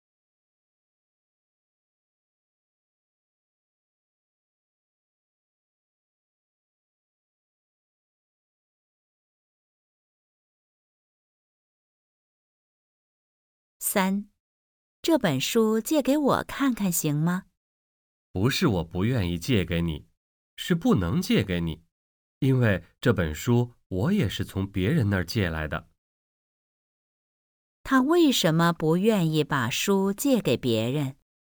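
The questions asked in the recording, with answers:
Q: 他为什么不愿意把书借给别人?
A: 这本书也是从别人那儿借来的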